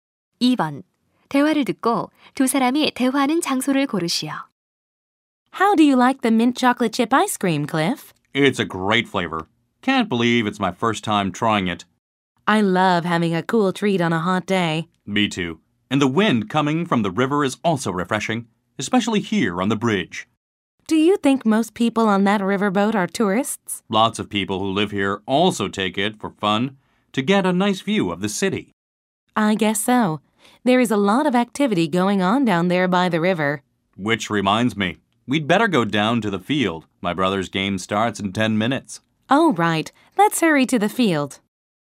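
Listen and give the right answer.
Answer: 강 위의 다리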